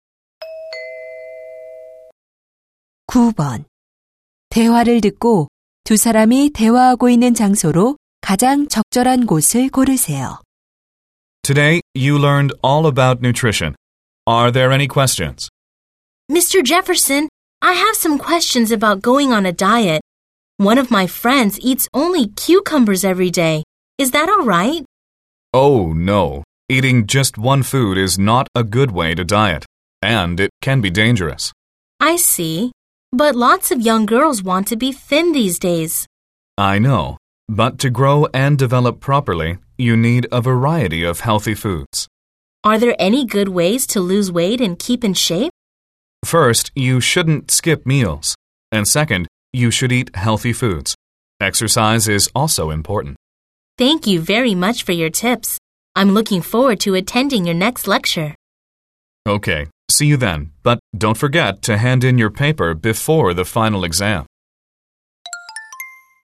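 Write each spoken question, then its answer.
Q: 대화를 듣고 두 사람이 대화하고 있는 장소로 가장 적절한 곳을 고르세요.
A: 강의실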